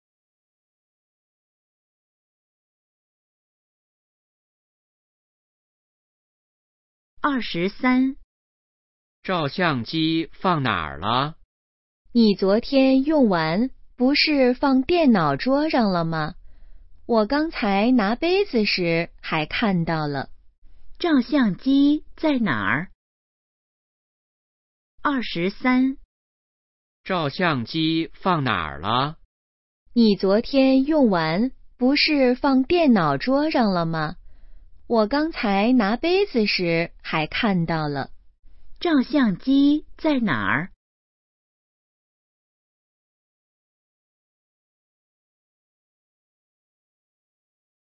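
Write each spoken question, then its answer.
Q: 照相机在哪儿?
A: 电脑桌上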